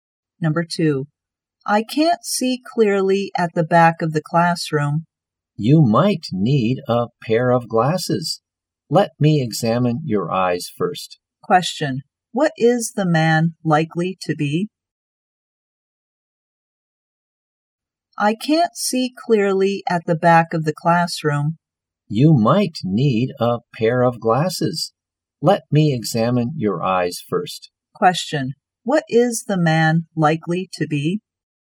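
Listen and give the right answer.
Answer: An eye doctor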